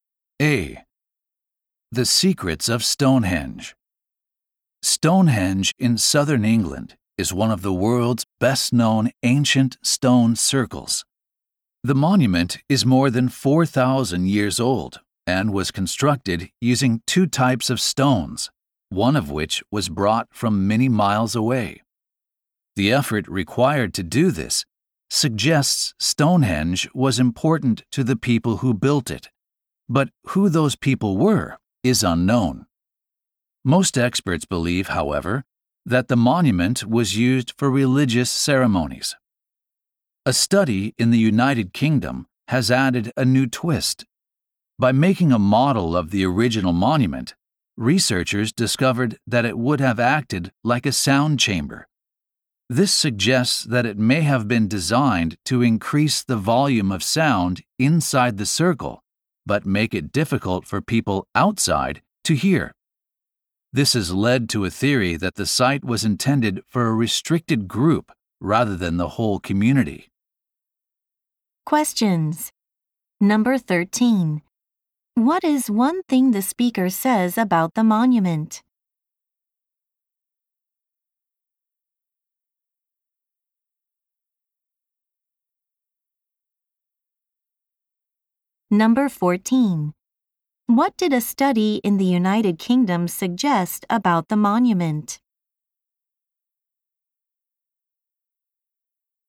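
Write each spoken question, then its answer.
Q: What is one thing the speaker says about the monument?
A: It is over 4,000 years old and was built with two types of stone, one brought from far away; who built it is unknown.

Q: What did a study in the United Kingdom suggest about the monument?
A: It acted like a sound chamber, so it may have been meant for a restricted group rather than the whole community.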